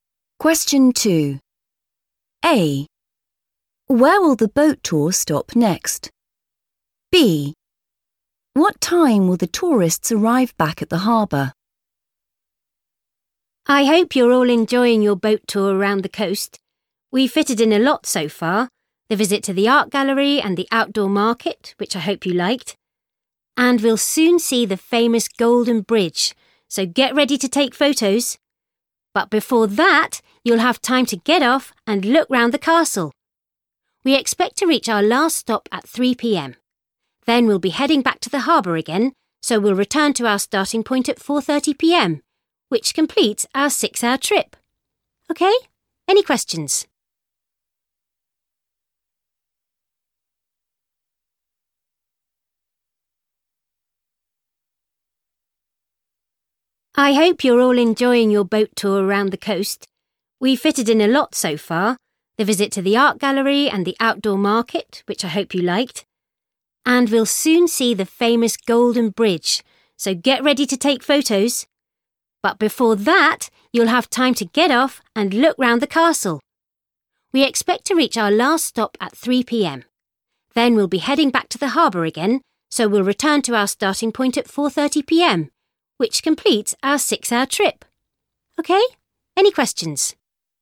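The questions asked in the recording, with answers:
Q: Where will the boat tour stop next?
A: the castle

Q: What time will the tourists arrive back at the harbour?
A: 4:30 p.m.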